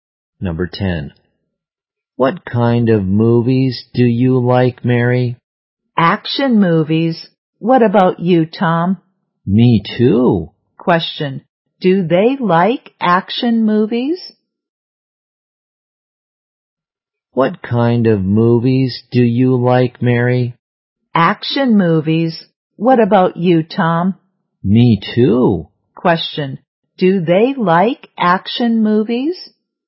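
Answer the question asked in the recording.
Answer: Yes, they do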